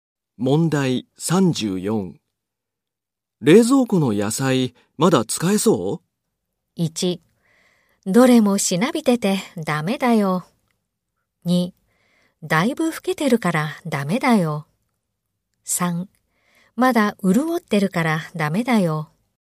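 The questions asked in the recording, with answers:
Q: 冷蔵庫の野菜まだ使えそう?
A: 1: どれもしなびててダメだよ。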